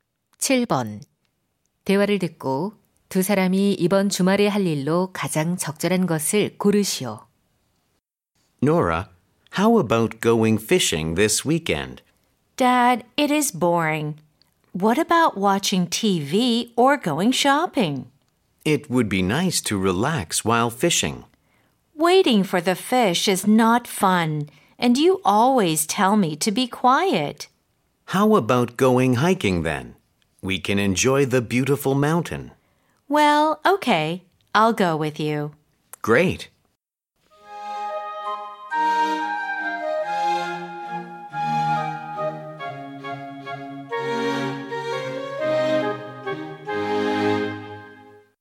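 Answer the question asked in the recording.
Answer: 등산 가기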